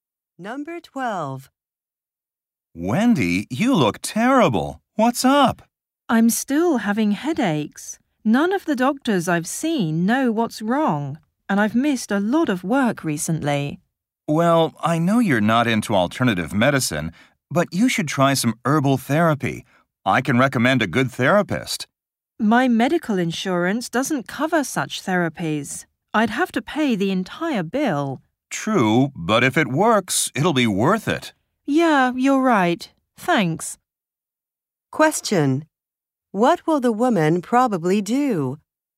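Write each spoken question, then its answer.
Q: What will the woman probably do?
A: Try herbal therapy.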